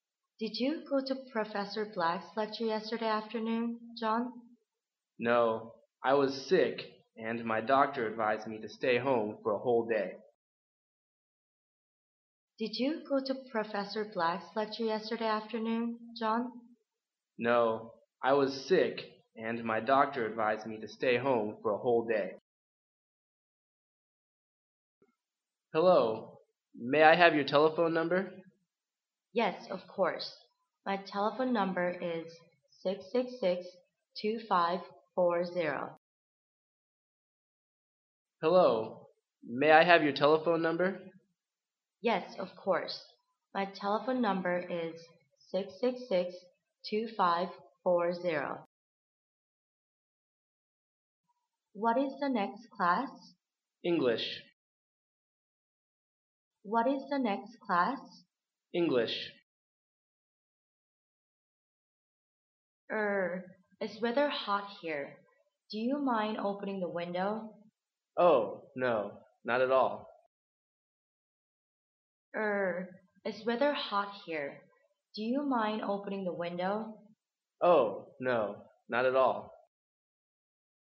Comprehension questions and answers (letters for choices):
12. Why didn't John go to the lecture?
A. He forgot it.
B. He was sick.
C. He was out.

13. What's the woman's telephone number?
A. 666—2540.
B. 666—2504.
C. 666—5240.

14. What are the two speakers?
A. Workers.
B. Students.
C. Foreigners.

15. What does the man mean?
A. He doesn't agree with the woman.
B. He feels hot too.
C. He agrees to open the window.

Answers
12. B
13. A
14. B
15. C

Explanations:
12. [听力原文] F:Did you go to Professor Black's lecture yesterday afternoon,John? M:No.1 was sick and my doctor advised me to stay at home for a whole day. 本题女士问男士去听讲座没有,男士直接否定回答,然后指出了原因:I was sick,并且说医生建议他待在家里一整天,因此答案是[B]。
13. [听力原文] M:Hello!May I have your telephone number? F:Yes,of Course.My telephone number is 666—2540. 本题为数字题。对话中出现的电话号码是666—2540。
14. [听力原文] F:What is the next class? M:English. 本题考查的是对话双方的身份。对话中,女士询问下一节是什么课,男士则回答说是英语课。这种对话只有学生之间才会有,故本题答案是[B]。
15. [听力原文] F:Er...it's rather hot here.Do you mind opening the window? M:Oh.no.Not at all. 回答别人用Would you mind...提出的问题(一般是要求或者请求)时,若是肯定回答,那就是不同意别人的要求,反之则是同意。本题男士用的是否定回答,故其意就是同意女士的要求。而女士的要求是opening the windowr,故本题答案是[C]。注意,有些考生误选了[B]项。该项是说男士也觉得热,但由对话来看,男士只是同意女士开窗,至于他觉不觉得热并没有体现。事实上,男士完全有可能是出于礼貌而同意开窗。